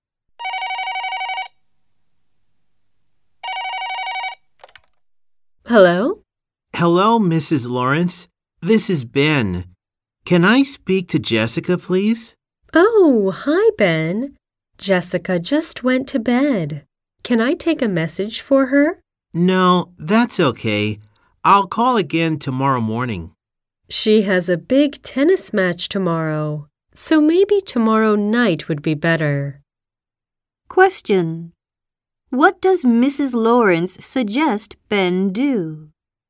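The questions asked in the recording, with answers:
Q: What does Mrs. Lawrence suggest Ben do?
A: Call Jessica tomorrow night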